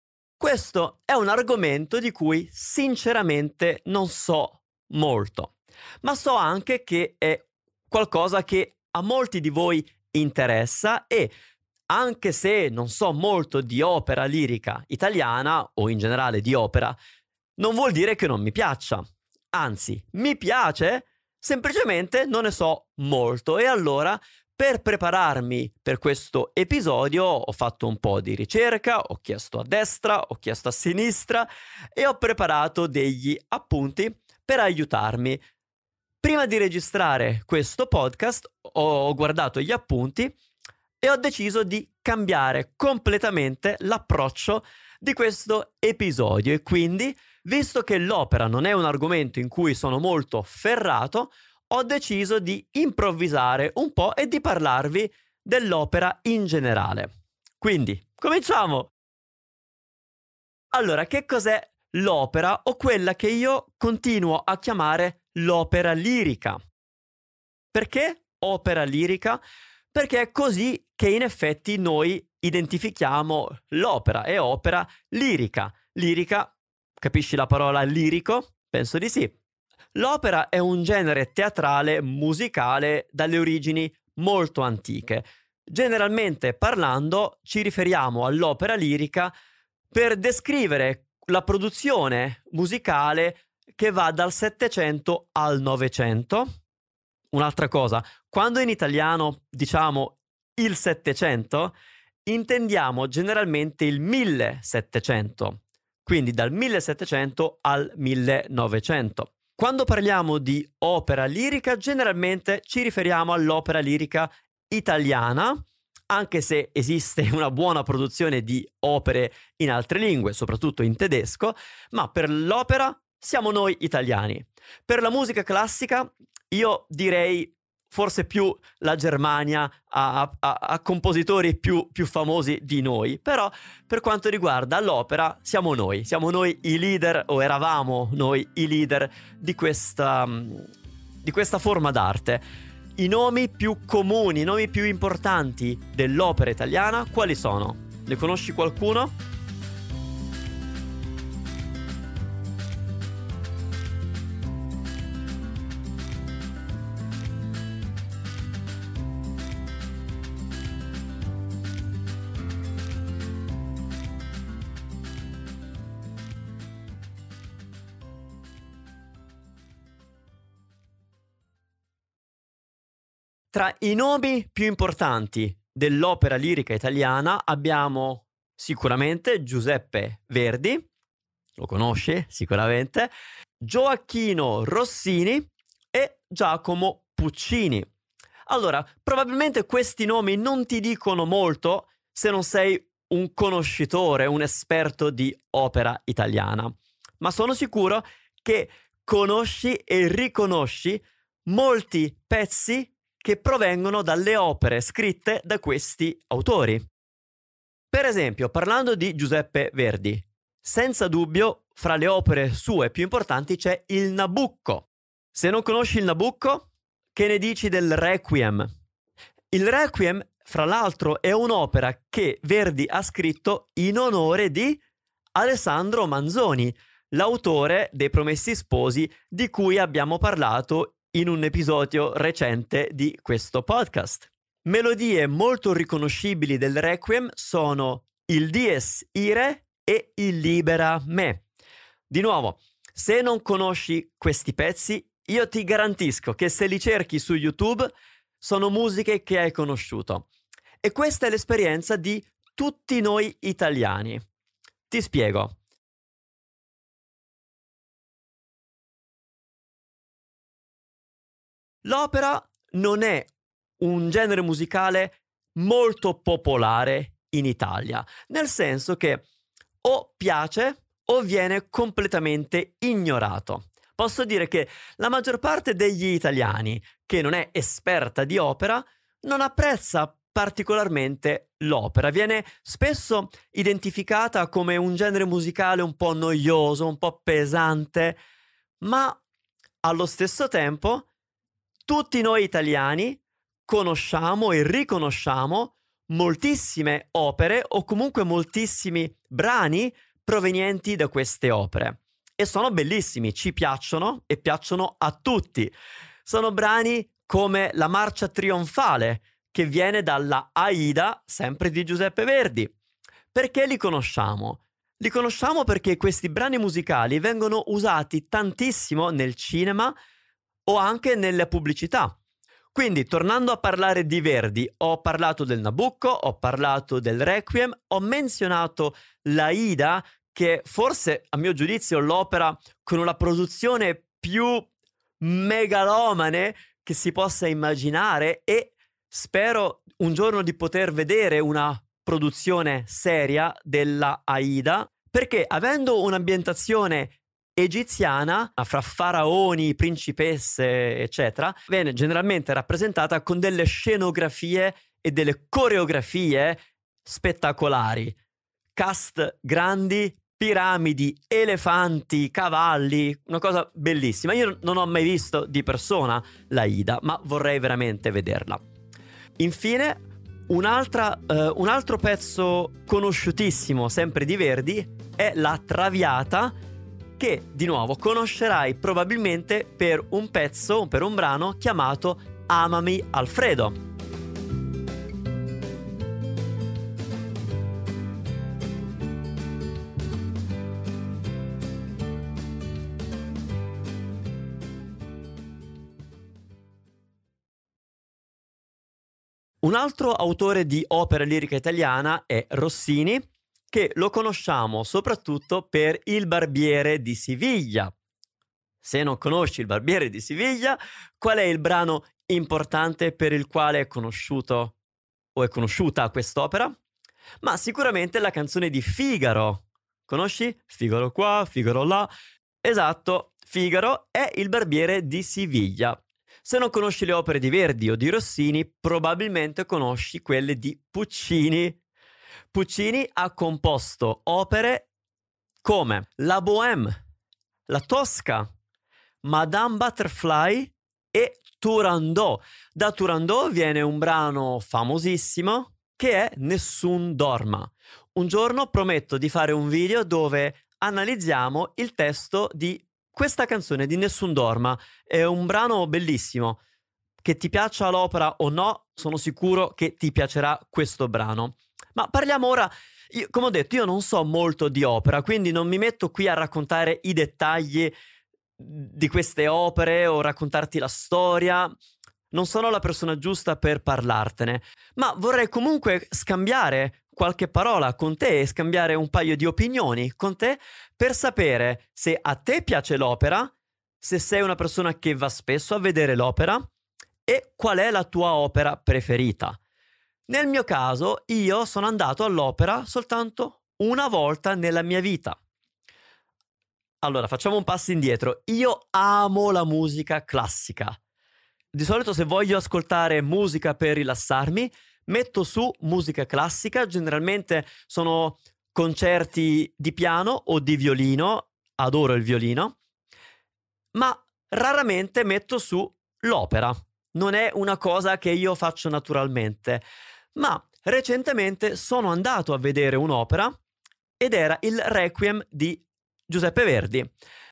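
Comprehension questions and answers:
Here are your TRUE/ FALSE Comprehension questions.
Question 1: Manu è un esperto di Opera lirica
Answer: Falso

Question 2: Manu va spesso all'Opera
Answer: Falso

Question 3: L'Opera lirica esiste solo in italiano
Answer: Falso

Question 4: La maggior parte degli italiani ama l'Opera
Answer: Falso

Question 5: Spesso gli italiani conoscono i brani d'Opera usati nel cinema o nella pubblicità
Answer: Vero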